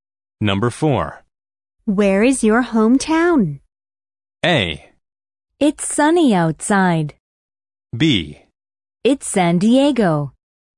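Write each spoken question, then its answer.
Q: Where is your hometown?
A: B: It's San Diego.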